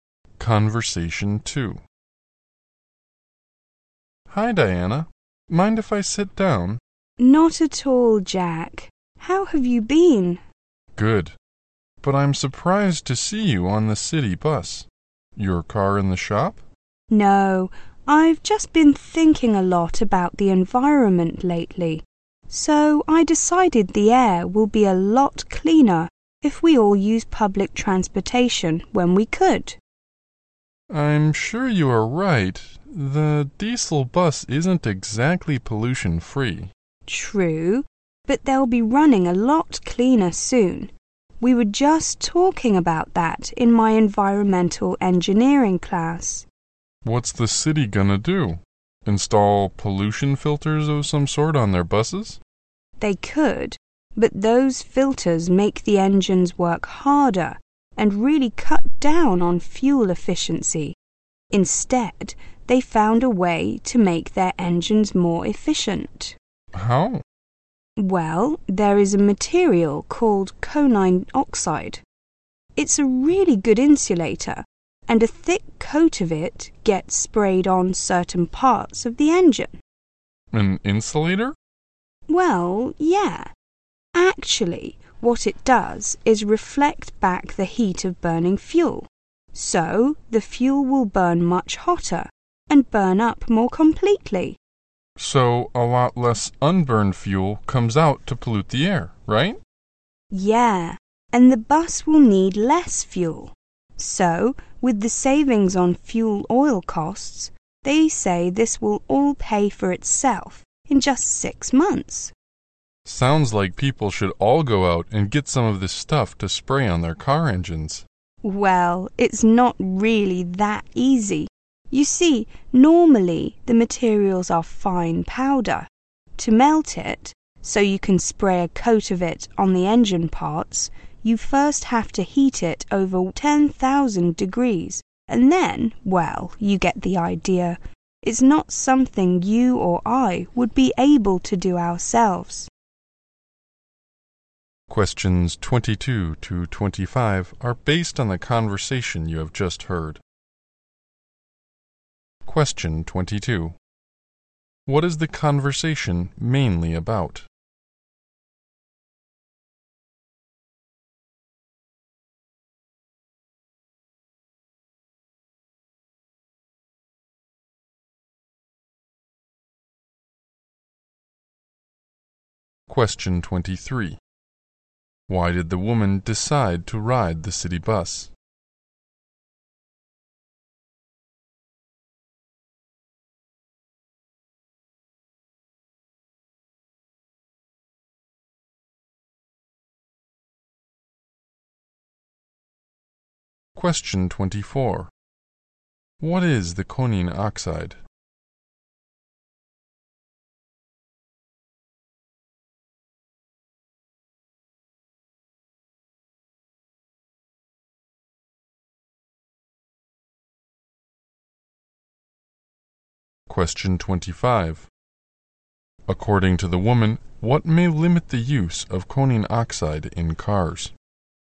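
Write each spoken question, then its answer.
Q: What is the conversation mainly about?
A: Making bus engines cleaner and more efficient

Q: Why did the woman decide to ride the city bus?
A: To help reduce air pollution

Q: What is the conine oxide?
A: An insulating material sprayed on engine parts

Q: According to the woman, what may limit the use of conine oxide in cars?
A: It must be heated to over 10,000 degrees to apply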